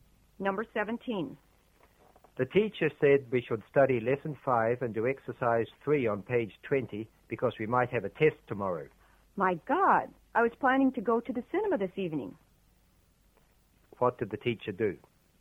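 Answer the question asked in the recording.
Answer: Told them to study lesson 5 and do exercise 3 because there might be a test tomorrow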